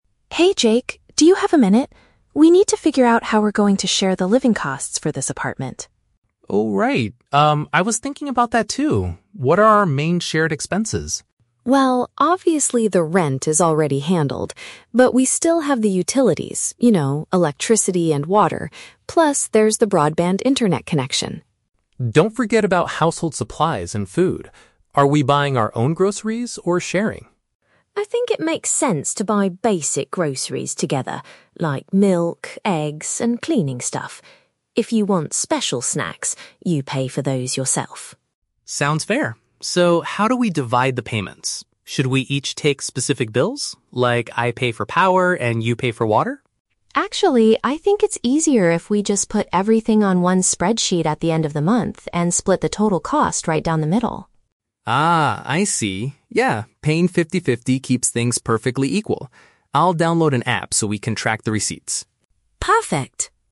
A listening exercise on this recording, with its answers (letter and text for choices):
Listen to a conversation between two roommates and choose the correct answer (A, B, or C) for each question.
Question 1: What kind of food do the roommates agree to purchase together?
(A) Specific personal treats.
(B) Everyday essential items.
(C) Expensive restaurant meals.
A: (B) Everyday essential items.

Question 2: What was Jake's initial suggestion for handling the utility payments?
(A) Splitting the final total amount in half.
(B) Asking the landlord to pay for them.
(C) Being responsible for different individual invoices.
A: (C) Being responsible for different individual invoices.

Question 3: What will Jake do to help manage their shared finances?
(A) He will create a financial spreadsheet on his computer.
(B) He will use a mobile program to record their spending.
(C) He will keep all the physical receipts in a special folder.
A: (B) He will use a mobile program to record their spending.

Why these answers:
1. Emma suggests buying "basic groceries together, like milk, eggs," which are everyday essential items. Why the trap is wrong: Option (A) is the trap. Emma mentions "special snacks" (personal treats), but she explicitly says, "you pay for those yourself," meaning they will not purchase them together. Option (C) is a plausible food expense but is never mentioned in the audio.
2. Jake asks, "Should we each take specific bills? Like, I pay for power, and you pay for water?" "Individual invoices" is a paraphrase for specific bills. Why the trap is wrong: Option (A) is the trap. Splitting the total cost in half ("fifty-fifty") is Emma's idea and their final decision, not Jake's initial suggestion. Option (B) is a plausible renting situation, but the landlord is only mentioned implicitly regarding rent, not for paying utilities.
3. At the end, Jake says, "I'll download an app so we can track the receipts." A "mobile program" is a synonym for an app, and "record their spending" means tracking receipts. Why the trap is wrong: Option (A) is the trap. The audio mentions putting everything on a "spreadsheet," but that was Emma's suggestion for calculating the total, not the specific action Jake promises to do. Option (C) is a plausible way to track expenses, but Jake specifically mentions downloading an app, not keeping physical receipts in a folder.

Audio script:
Emma: Hey Jake, do you have a minute? We need to figure out how we're going to share the living costs for this apartment.
Jake: Oh, right. Um, I was thinking about that too. What are our main shared expenses?
Emma: Well, obviously the rent is already handled. But we still have the utilities—you know, electricity and water. Plus, there's the broadband internet connection.
Jake: Don't forget about household supplies and food. Are we buying our own groceries, or sharing?
Emma: I think it makes sense to buy basic groceries together, like milk, eggs, and cleaning stuff. If you want special snacks, you pay for those yourself.
Jake: Sounds fair. So, how do we divide the payments? Should we each take specific bills? Like, I pay for power, and you pay for water?
Emma: Actually, I think it's easier if we just put everything on one spreadsheet at the end of the month and split the total cost right down the middle.
Jake: Ah, I see. Yeah, paying fifty-fifty keeps things perfectly equal. I'll download an app so we can track the receipts.